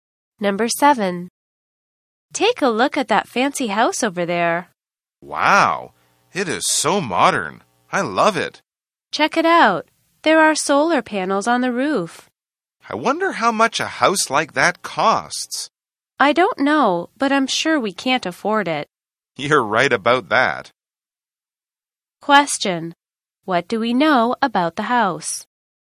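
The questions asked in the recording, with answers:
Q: What do we know about the house?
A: It is modern and has solar panels on the roof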